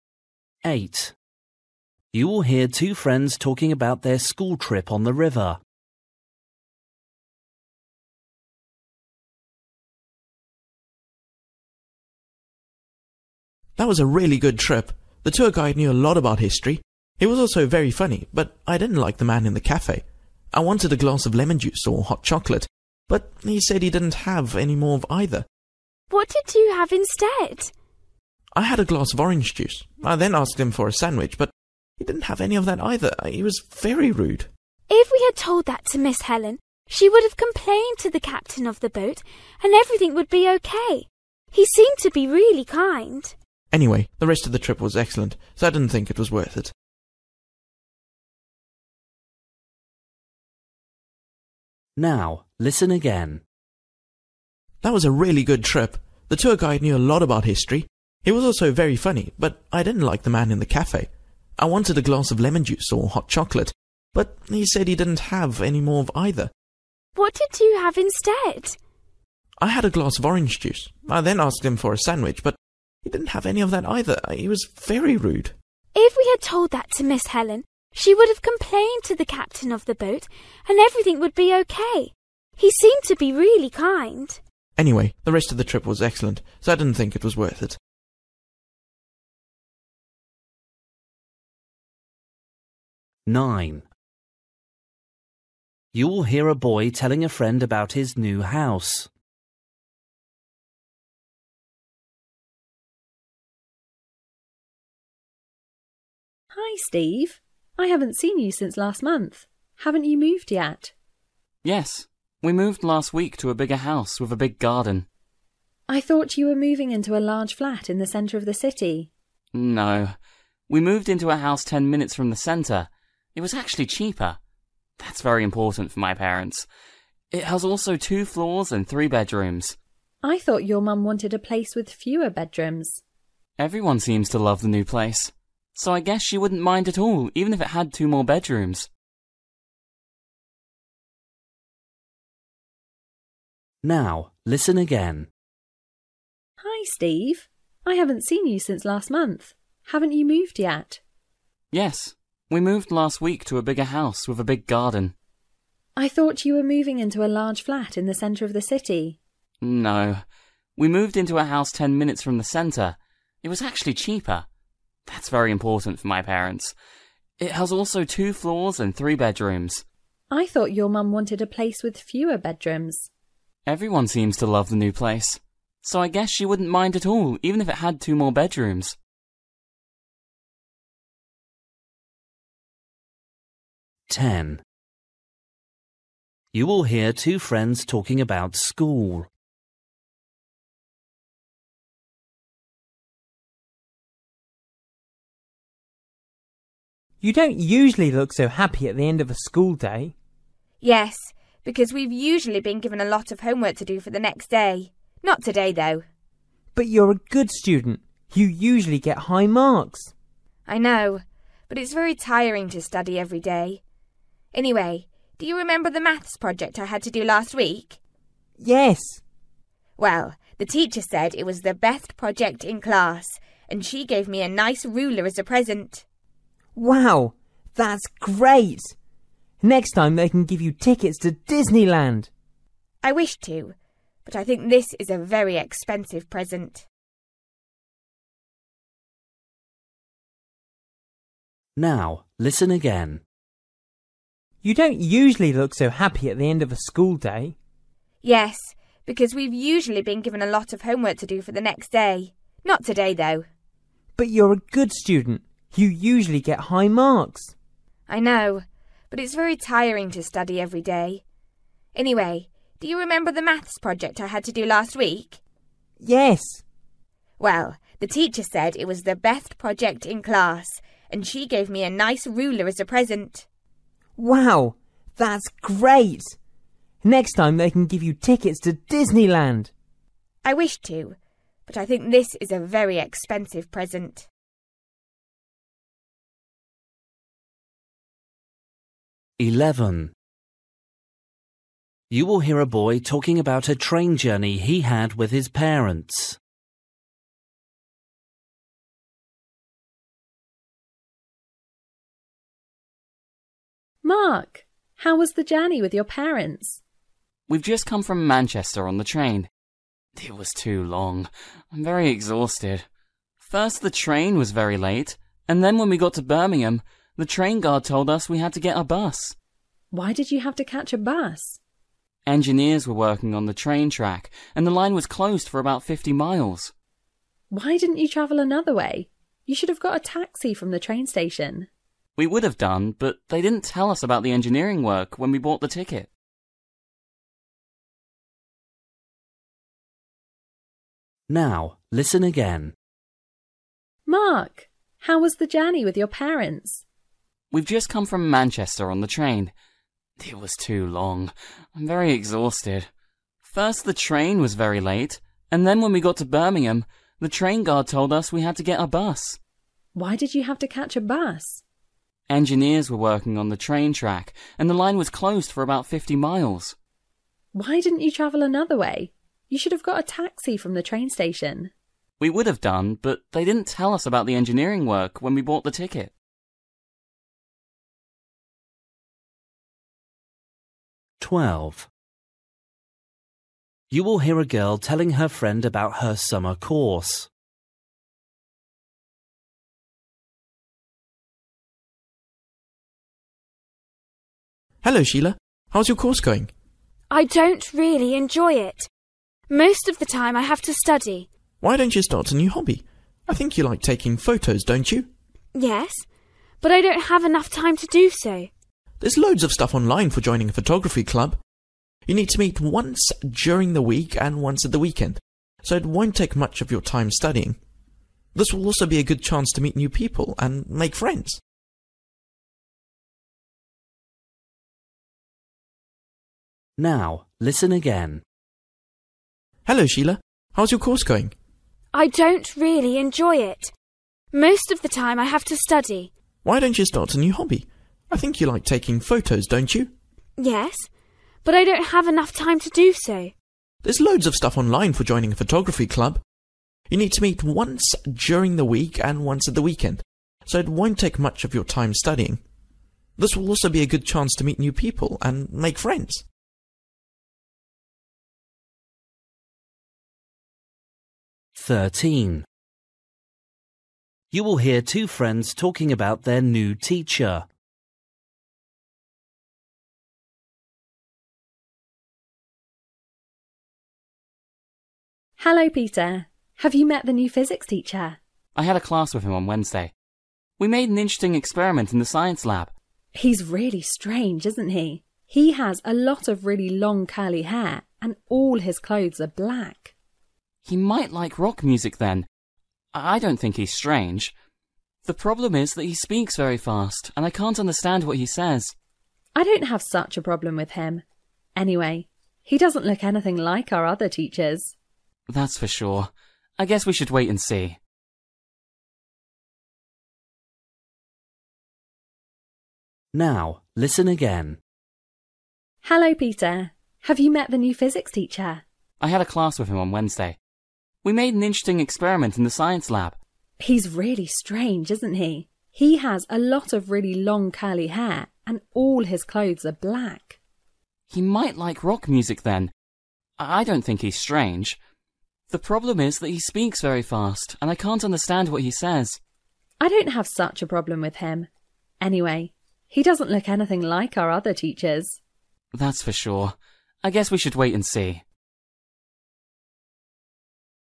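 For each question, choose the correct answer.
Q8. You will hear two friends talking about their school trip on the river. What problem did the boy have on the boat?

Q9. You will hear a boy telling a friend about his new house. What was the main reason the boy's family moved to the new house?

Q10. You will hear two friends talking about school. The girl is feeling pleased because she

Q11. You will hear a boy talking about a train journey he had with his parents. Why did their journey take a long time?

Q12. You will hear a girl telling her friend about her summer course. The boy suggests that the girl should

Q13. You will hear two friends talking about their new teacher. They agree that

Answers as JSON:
{"8": "The man in the cafe was rude and didn't have the drink or food he wanted", "9": "It was cheaper", "10": "got a present for the best maths project in class", "11": "Engineering work closed the line, so they had to take a bus", "12": "join a photography club", "13": "he doesn't look like their other teachers"}

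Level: Luyện nghe trình độ B1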